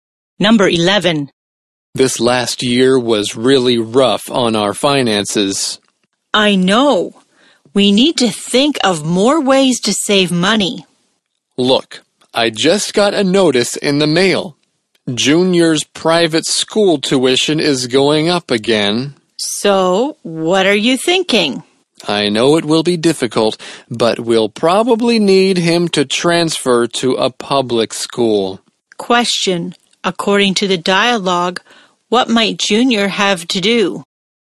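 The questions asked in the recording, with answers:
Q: According to the dialogue, what might Junior have to do?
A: Transfer to a public school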